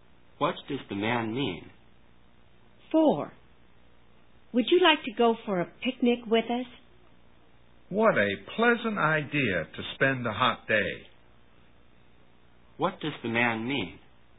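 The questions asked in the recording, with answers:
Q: What does the man mean?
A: He'd like to go on the picnic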